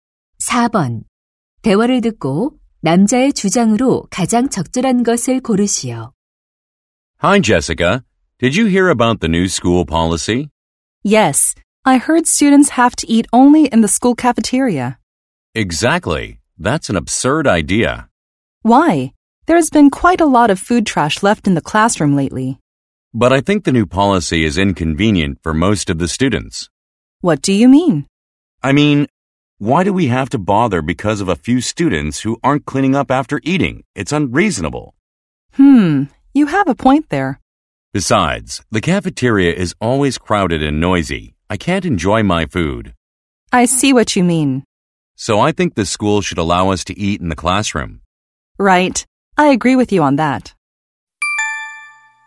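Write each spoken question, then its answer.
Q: 대화를 듣고 남자의 주장으로 가장 적절한 것을 고르시오.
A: 학교는 교실에서 음식을 먹을 수 있게 허용해야 한다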